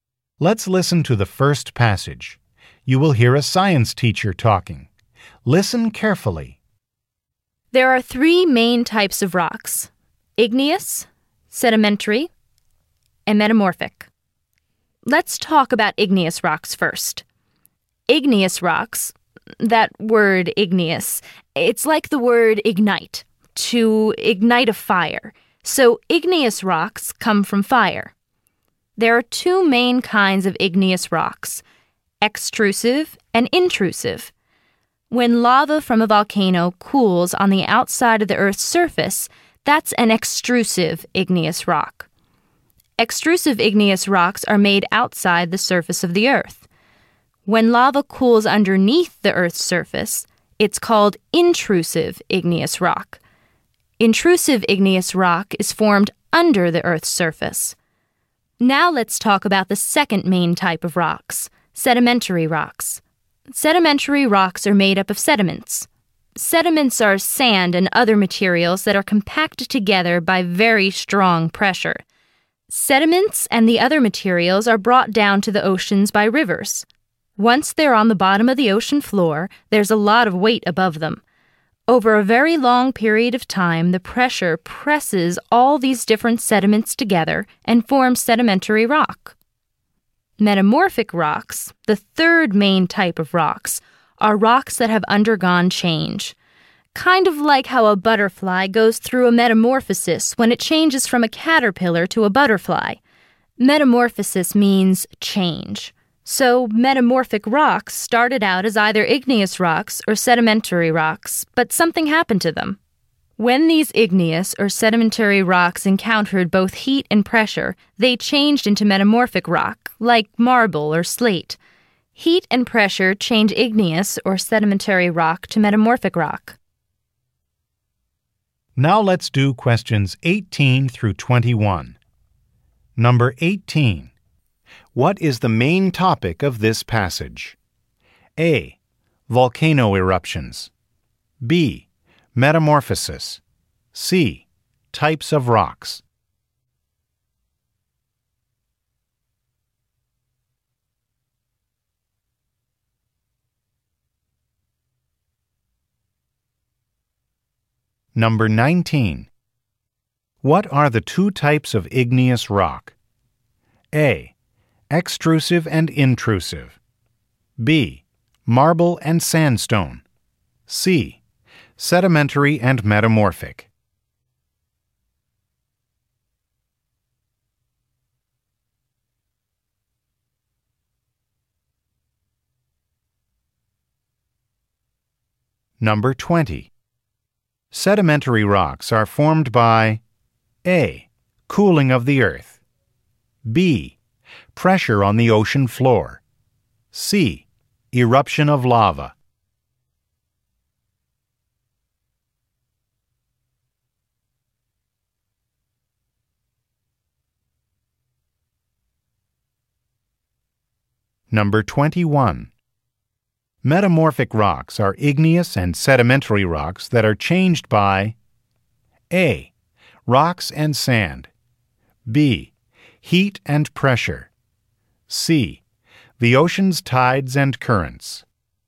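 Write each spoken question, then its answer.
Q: What is the main topic of this passage?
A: C: Types of rocks.

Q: What are the two types of igneous rock?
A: A: Extrusive and intrusive.

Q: Sedimentary rocks are formed by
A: B: Pressure on the ocean floor.

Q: Metamorphic rocks are igneous and sedimentary rocks that are changed by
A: B: Heat and pressure.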